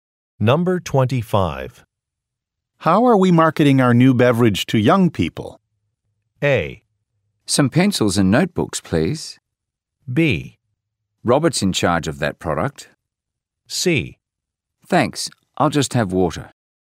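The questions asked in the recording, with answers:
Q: How are we marketing our new beverage to young people?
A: B: Robert's in charge of that product.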